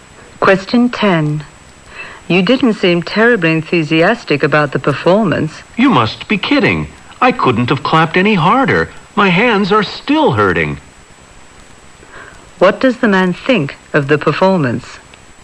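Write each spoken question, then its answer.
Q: What does the man think of the performance?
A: He thought it was excellent.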